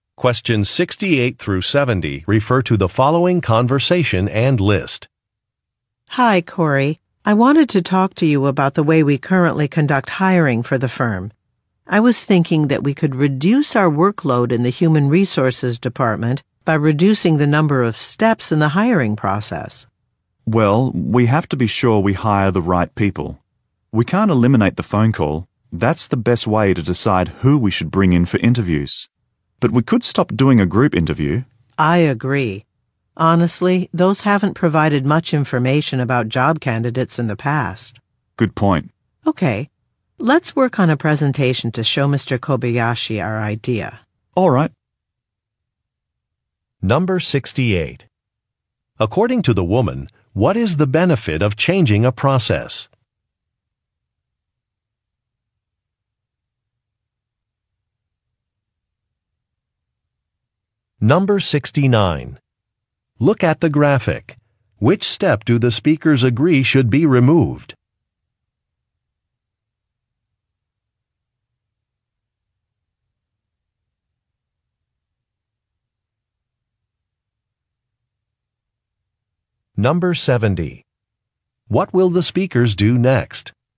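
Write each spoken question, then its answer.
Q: According to the woman, what is the benefit of changing a process?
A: It would reduce the workload in the human resources department.

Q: What will the speakers do next?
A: Work on a presentation for Mr. Kobayashi.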